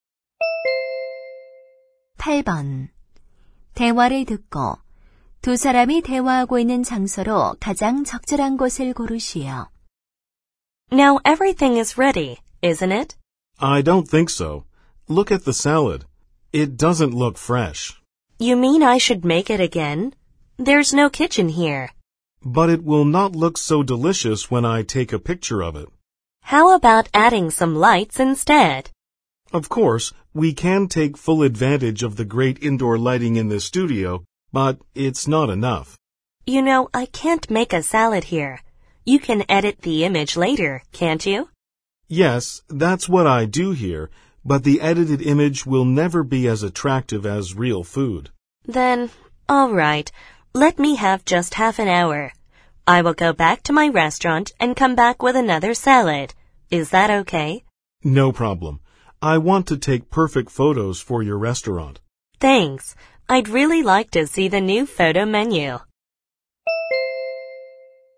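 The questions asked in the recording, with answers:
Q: 대화를 듣고 두 사람이 대화하고 있는 장소로 가장 적절한 곳을 고르시오.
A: 사진 스튜디오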